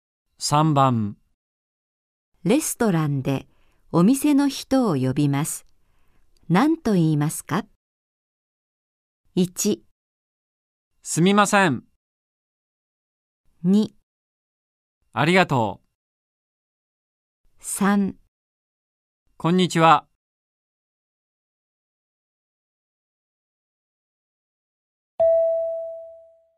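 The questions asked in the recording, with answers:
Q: レストランでお店の人を呼びます。何と言いますか?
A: 1: すみません。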